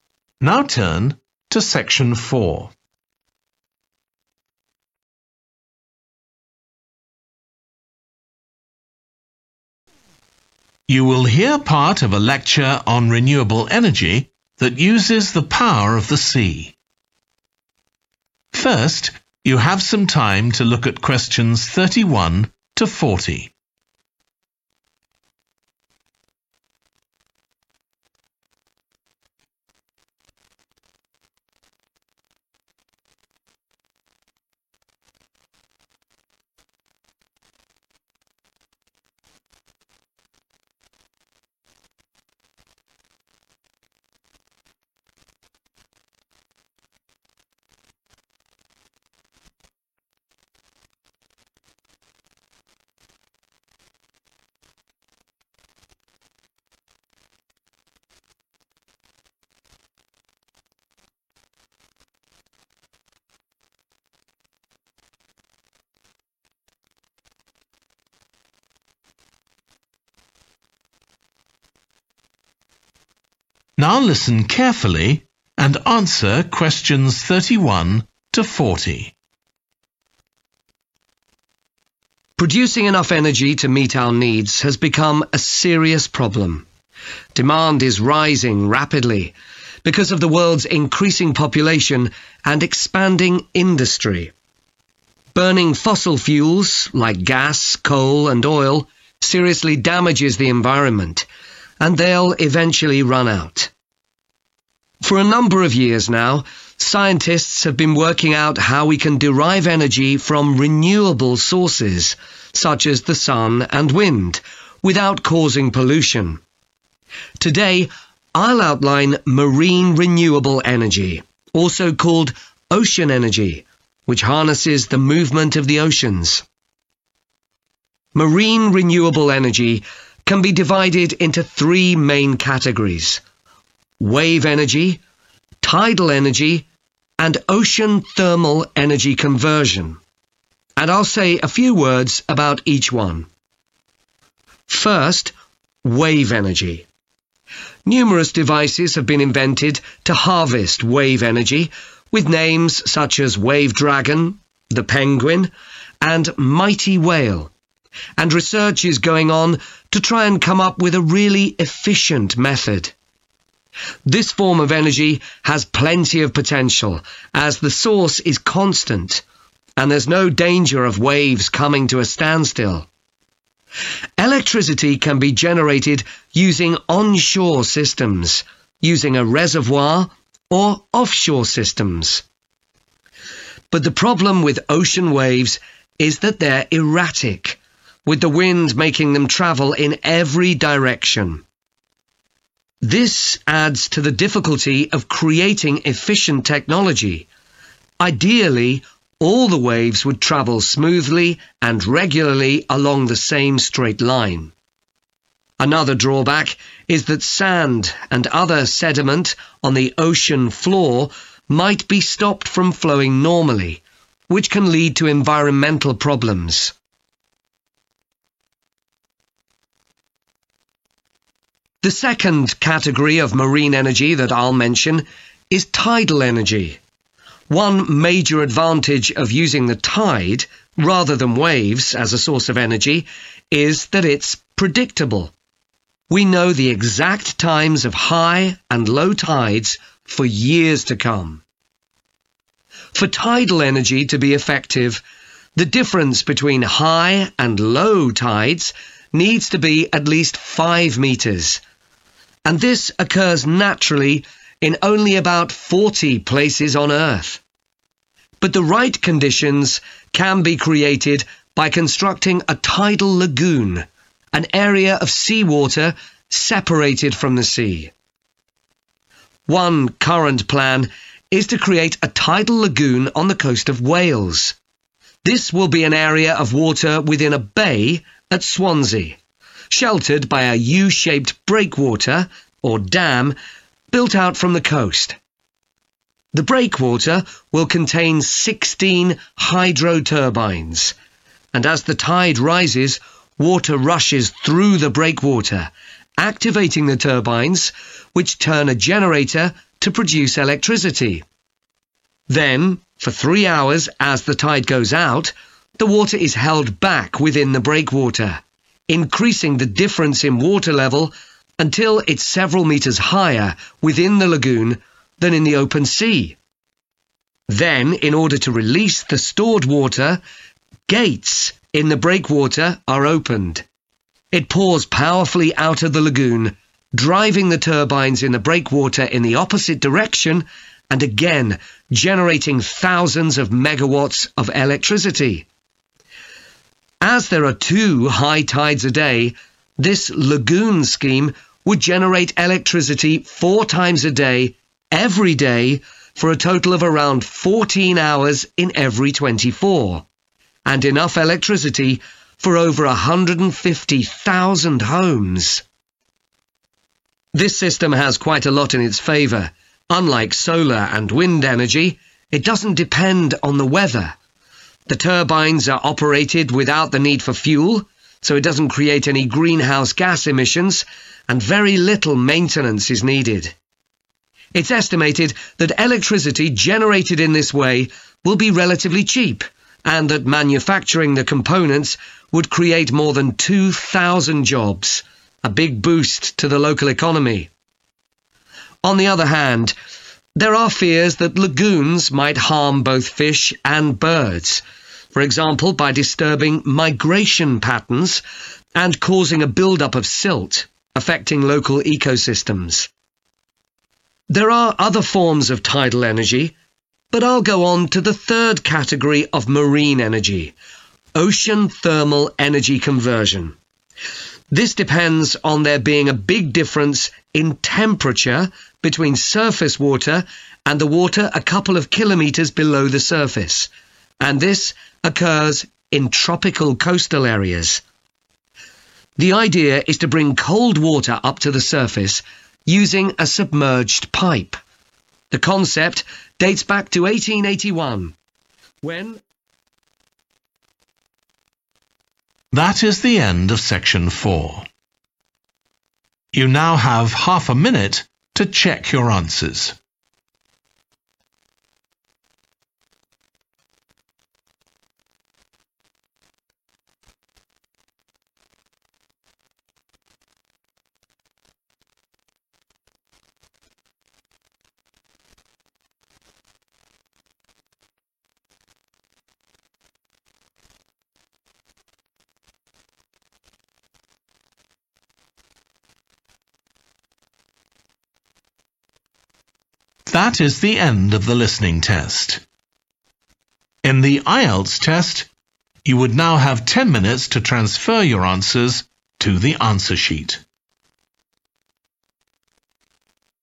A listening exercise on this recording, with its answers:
Complete the notes below. Write ONE WORD ONLY for each answer.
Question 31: More energy required because of growth in population and 31.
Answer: industry

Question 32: – Advantage: waves provide a 32. source of renewable energy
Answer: constant

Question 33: – waves can move in any 33.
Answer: direction

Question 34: – movement of sand, etc. on the 34. of the ocean may be affected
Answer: floor

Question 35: Tides are more 35. than waves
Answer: predictable

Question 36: – will be created in a 36. at Swansea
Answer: bay

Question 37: – stored water is released through 37. , driving the turbines in the reverse direction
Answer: gates

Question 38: – no 38. is required to make it work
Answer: fuel

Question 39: – likely to create a number of 39.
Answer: jobs

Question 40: – may ham fish and birds, e.g. by affecting 40. and building up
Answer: migration